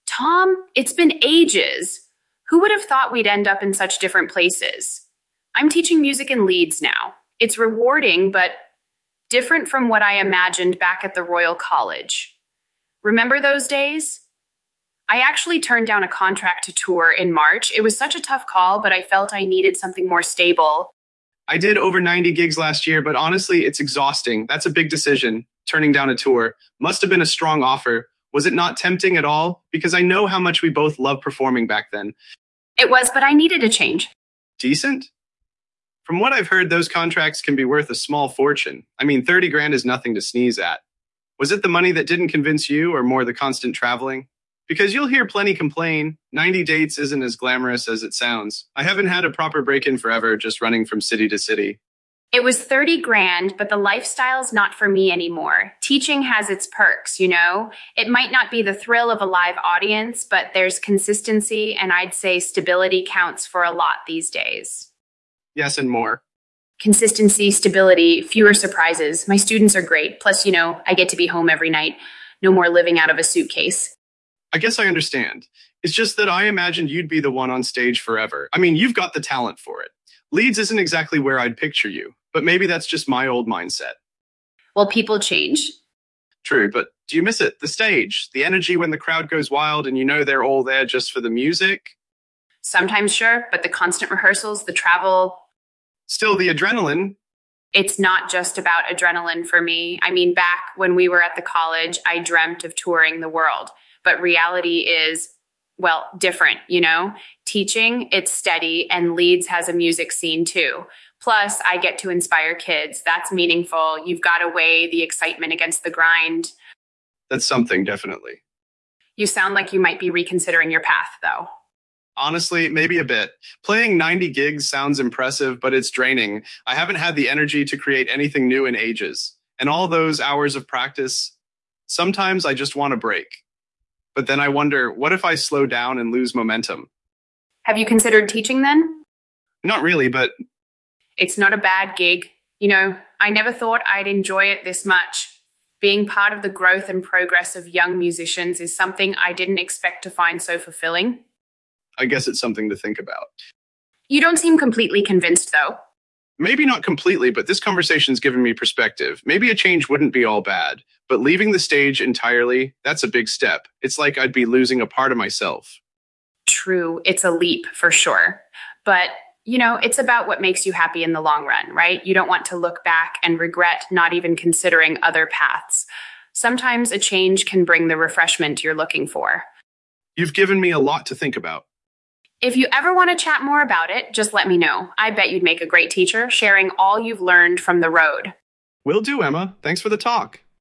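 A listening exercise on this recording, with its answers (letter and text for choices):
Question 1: What does Emma emphasize about her new career in teaching?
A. She misses the thrill of performing on stage.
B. It offers her stability and consistency.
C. She values being home every night.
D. She finds it fulfilling to inspire young musicians.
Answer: B. It offers her stability and consistency.

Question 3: Why did Emma turn down the contract to tour?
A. She wanted to continue her studies.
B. She preferred the stability of teaching.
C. She did not want to perform that many gigs.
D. She found the constant travel exhausting.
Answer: B. She preferred the stability of teaching.

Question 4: What does Tom imply about his future plans?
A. He is unsure about making a complete career change.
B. He plans to tour less and focus on recording.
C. He feels he needs a break from performing.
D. He is considering a career in teaching.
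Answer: A. He is unsure about making a complete career change.

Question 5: What does Emma mean when she says, 'people change'?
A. Her values and priorities have shifted over time.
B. She no longer enjoys performing as much as she used to.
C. She believes she will eventually return to performing.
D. She expects others to follow the same path as her.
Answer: A. Her values and priorities have shifted over time.

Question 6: What leads Tom to question his current lifestyle?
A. The lack of a proper break and creative exhaustion.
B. The draining nature of constant performing.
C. His desire to explore other musical genres.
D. Emma's enjoyment of teaching.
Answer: A. The lack of a proper break and creative exhaustion.

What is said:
Emma: Tom, it's been ages! Who would've thought we'd end up in such different places? I'm teaching music in Leeds now. It's rewarding but... different from what I imagined back at the Royal College. 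Remember those days? I actually turned down a contract to tour in March. It was such a tough call, but I felt I needed something more stable.
Tom: I did over 90 gigs last year, but honestly, it's exhausting. That's a big decision, turning down a tour. Must've been a strong offer. Was it not tempting at all? Because I know how much we both loved performing back then.
Emma: It was, but I needed a change.
Tom: Decent? From what I've heard, those contracts can be worth a small fortune. I mean, 30 grand is nothing to sneeze at. Was it the money that didn't convince you, or more the constant traveling? Because you'll hear plenty complain, ninety dates isn't as glamorous as it sounds. I haven't had a proper break in forever, just running from city to city.
Emma: It was thirty grand, but the lifestyle's not for me anymore. Teaching has its perks, you know? It might not be the thrill of a live audience, but there's consistency, and I'd say stability counts for a lot these days.
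Tom: Yes, and more.
Emma: Consistency, stability, fewer surprises. My students are great. Plus, you know, I get to be home every night. No more living out of a suitcase.
Tom: I guess I understand. It's just that I imagined you'd be the one on stage forever. I mean, you've got the talent for it. Leeds isn't exactly where I'd picture you, but maybe that's just my old mindset.
Emma: Well, people change.
Tom: True, but do you miss it? The stage? The energy when the crowd goes wild and you know they're all there just for the music?
Emma: Sometimes, sure. But the constant rehearsals, the travel—
Tom: Still, the adrenaline...
Emma: It's not just about adrenaline for me. I mean, back when we were at the college, I dreamt of touring the world. But reality is... well, different, you know? Teaching, it's steady, and Leeds has a music scene too. Plus, I get to inspire kids. That's meaningful. You've got to weigh the excitement against the grind.
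Tom: That's something, definitely.
Emma: You sound like you might be reconsidering your path, though.
Tom: Honestly, maybe a bit. Playing 90 gigs sounds impressive, but it's draining. I haven't had the energy to create anything new in ages. And all those hours of practice... sometimes I just want a break. But then I wonder, what if I slow down and lose momentum?
Emma: Have you considered teaching, then?
Tom: Not really, but...
Emma: It's not a bad gig. You know, I never thought I'd enjoy it this much. Being part of the growth and progress of young musicians is something I didn't expect to find so fulfilling.
Tom: I guess it's something to think about.
Emma: You don't seem completely convinced, though.
Tom: Maybe not completely, but this conversation's given me perspective. Maybe a change wouldn't be all bad. But leaving the stage entirely? It's like I'd be losing a part of myself.
Emma: True, it's a leap for sure. 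But, you know, it's about what makes you happy in the long run, right? You don't want to look back and regret not even considering other paths. Sometimes a change can bring the refreshment you're looking for.
Tom: You've given me a lot to think about.
Emma: If you ever want to chat more about it, just let me know. I bet you'd make a great teacher, sharing all you've learned from the road.

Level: C1 Advanced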